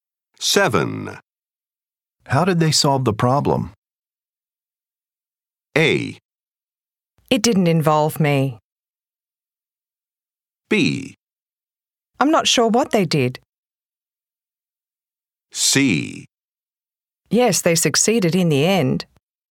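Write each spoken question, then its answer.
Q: How did they solve the problem?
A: B: I'm not sure what they did.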